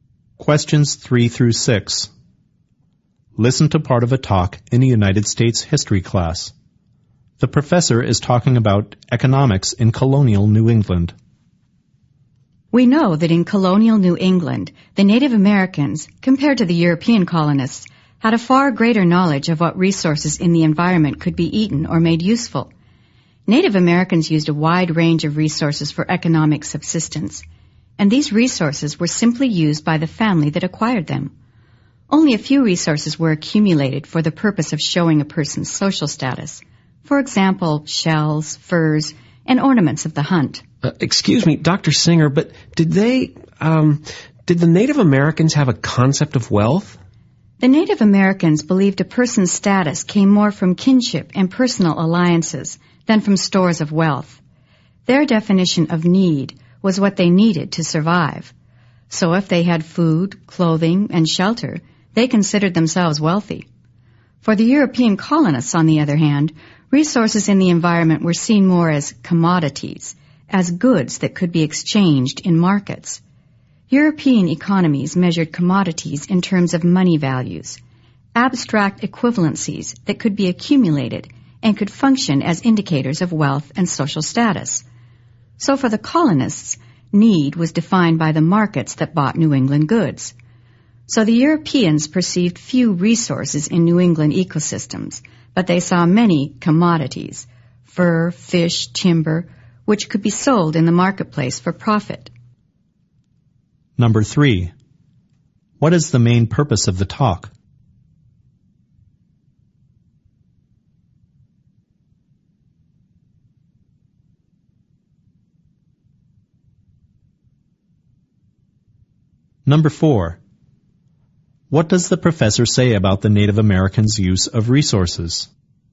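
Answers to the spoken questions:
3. To compare how Native Americans and European colonists viewed resources and wealth
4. They used a wide range of resources, mainly for the family's survival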